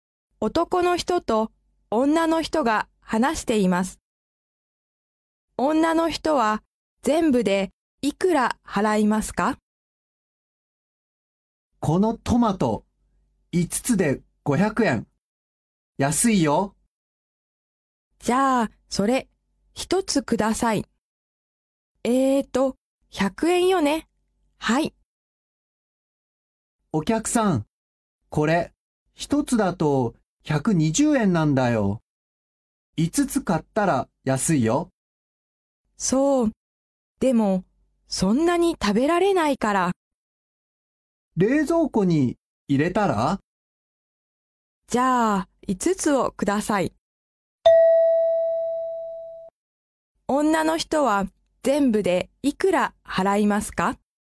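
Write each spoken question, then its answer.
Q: 女の人は全部でいくら払いますか?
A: 500円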